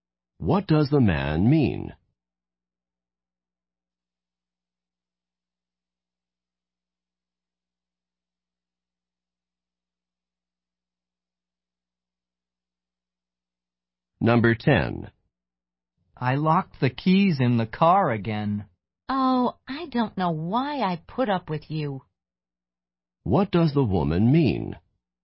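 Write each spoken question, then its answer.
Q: What does the woman mean?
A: She is annoyed but tolerates him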